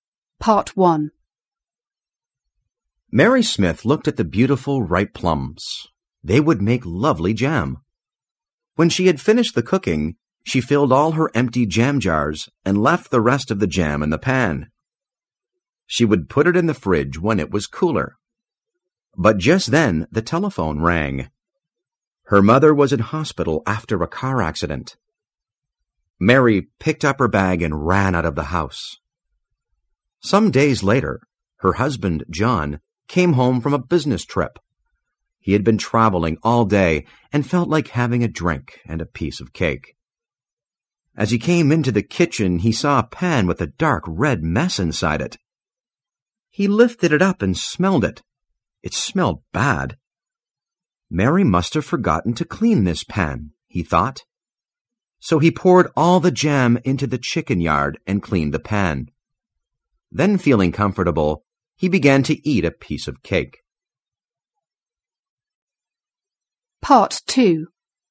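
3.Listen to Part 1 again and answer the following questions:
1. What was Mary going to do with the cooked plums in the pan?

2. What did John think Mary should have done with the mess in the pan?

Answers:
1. Put it in the fridge when it was cooler.
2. She should have cleaned the pan.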